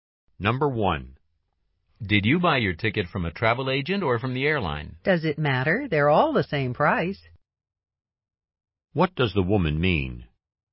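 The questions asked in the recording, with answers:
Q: What does the woman mean?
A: It doesn't matter where she bought it; the price is the same.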